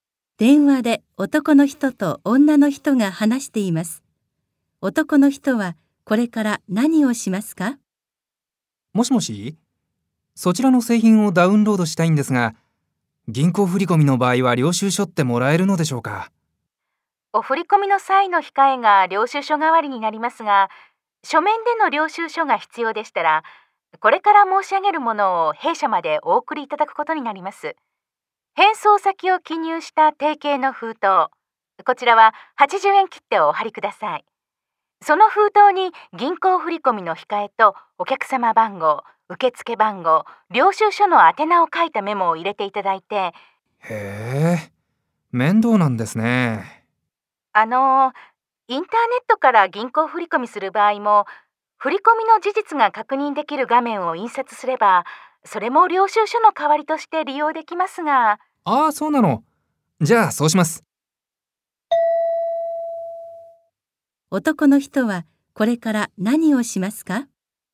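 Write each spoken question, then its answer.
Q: 男の人はこれから何をしますか?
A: インターネットで銀行振込をして、振込が確認できる画面を印刷する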